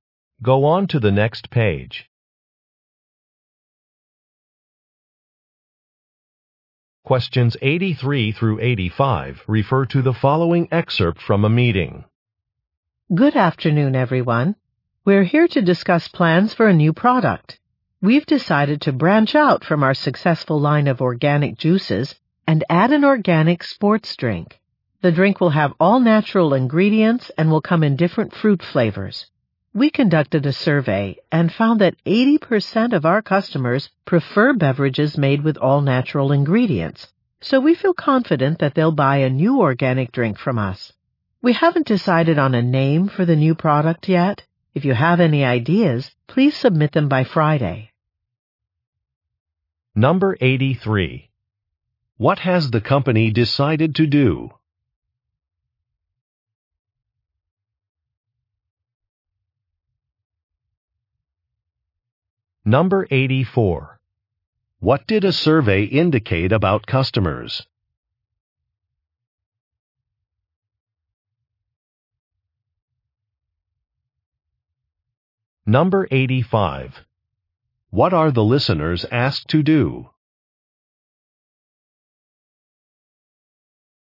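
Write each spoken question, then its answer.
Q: What has the company decided to do?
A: Add an organic sports drink

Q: What did a survey indicate about customers?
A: Most prefer beverages with all natural ingredients

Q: What are the listeners asked to do?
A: Submit name ideas by Friday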